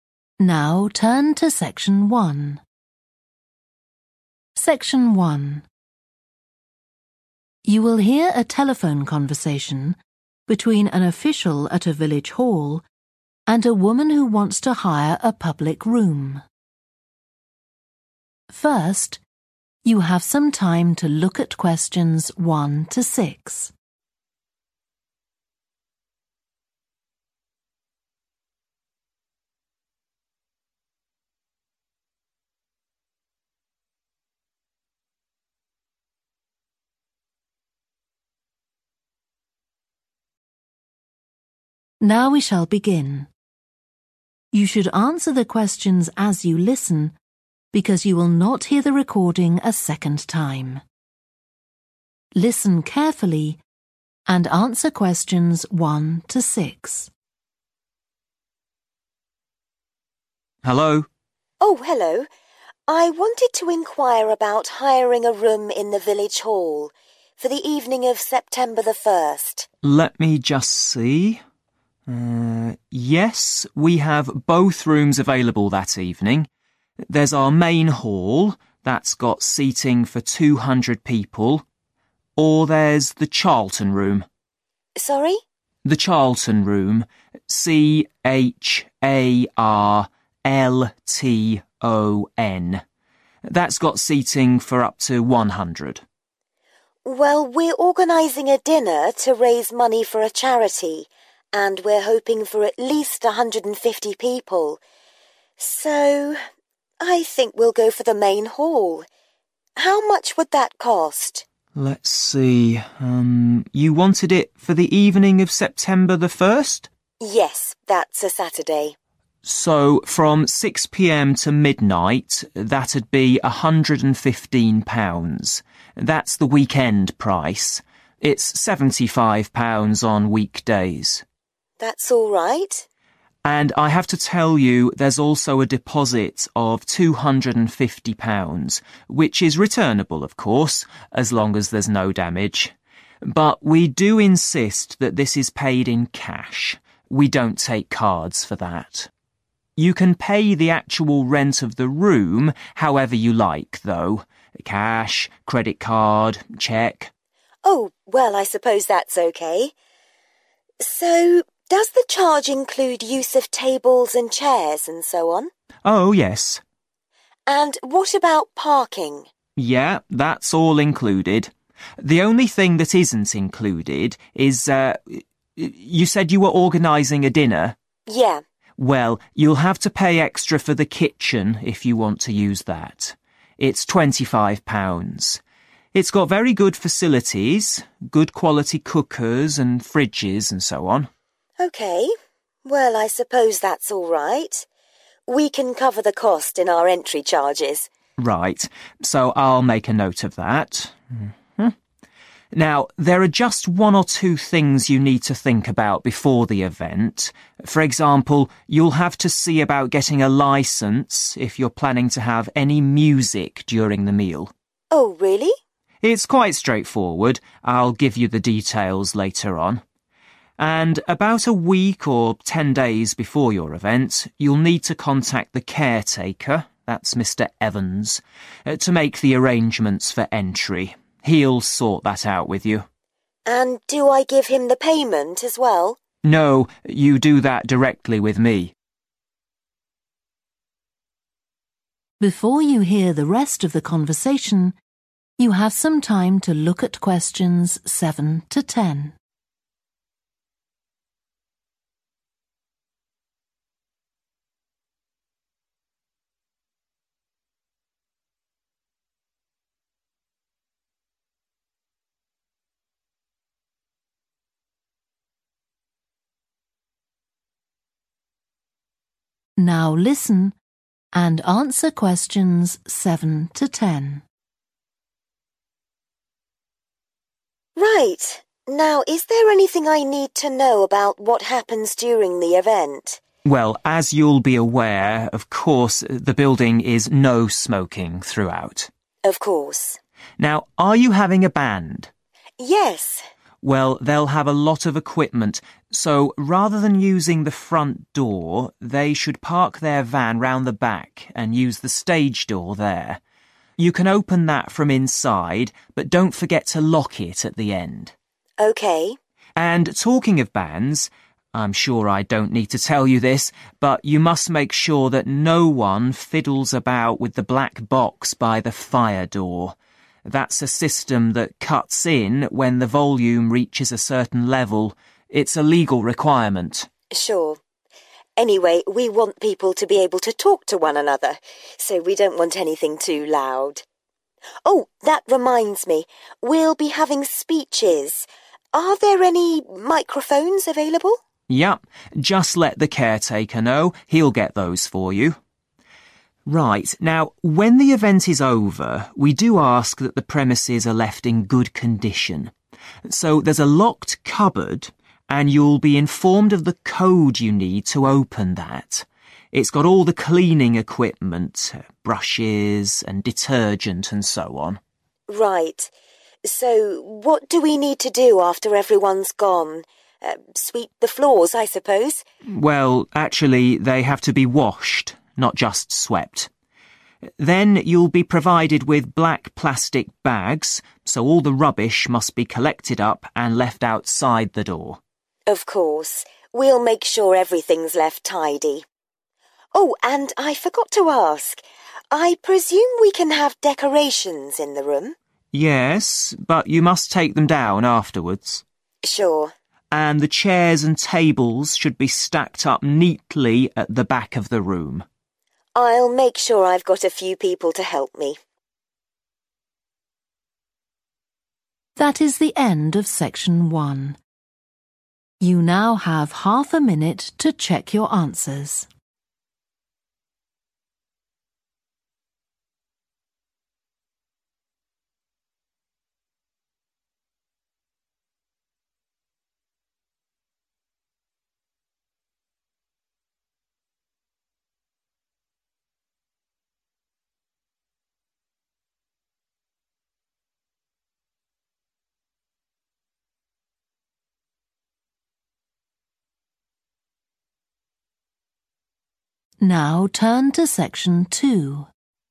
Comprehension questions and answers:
Complete the notes below. Write ONE WORD AND/OR A NUMBER.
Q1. The (1) room seats 100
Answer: Charlton

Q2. Cost of main hall for Saturday evening: (2) £ + £250 deposit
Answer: £115

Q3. (3) payment is required)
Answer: cash

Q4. Cost includes use of tables and chairs and also (4)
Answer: parking

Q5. Will need a (5) licence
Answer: music

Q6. Need to contact caretaker (Mr Evans) in advance to arrange (6)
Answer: entry

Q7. The band should use the (7) door at the back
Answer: stage

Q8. Need to know the (8) for the cleaning cupboard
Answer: code

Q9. The (9) must be washed and rubbish placed in black bags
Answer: floors

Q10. All (10) must be taken down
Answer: decorations